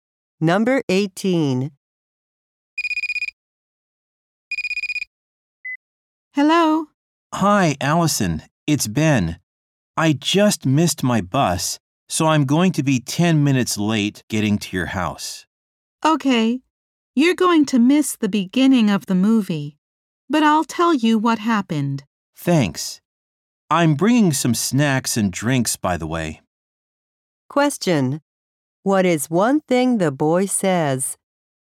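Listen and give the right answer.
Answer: He missed his bus and will be 10 minutes late.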